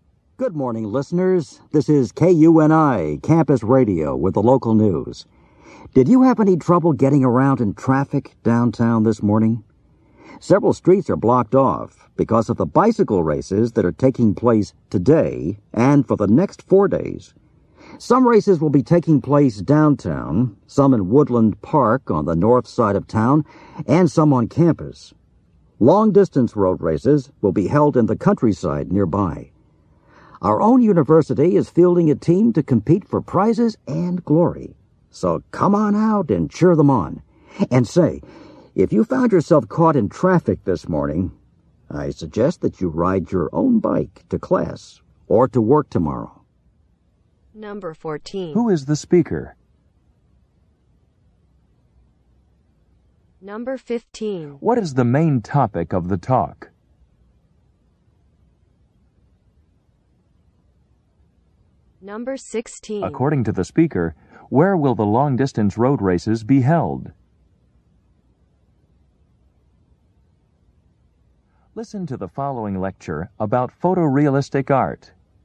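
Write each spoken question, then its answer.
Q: Who is the speaker?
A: A campus radio announcer

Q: What is the main topic of the talk?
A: The bicycle races and the traffic they cause

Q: According to the speaker, where will the long-distance road races be held?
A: In the countryside nearby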